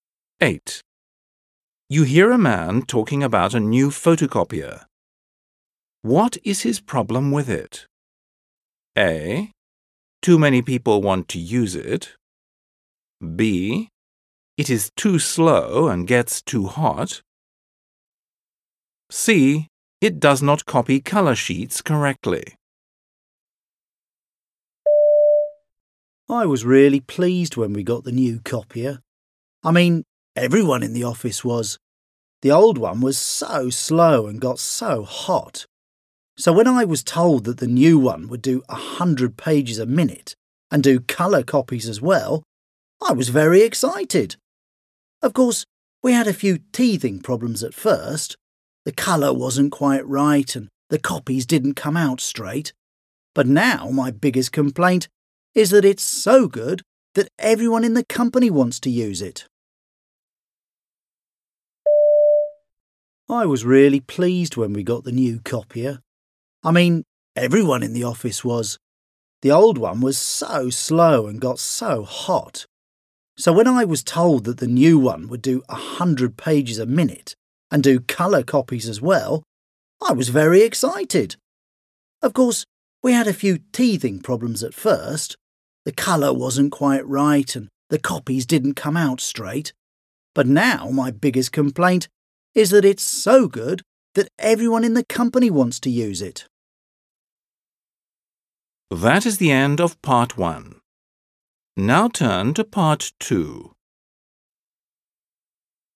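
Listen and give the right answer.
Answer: A: Too many people want to use it.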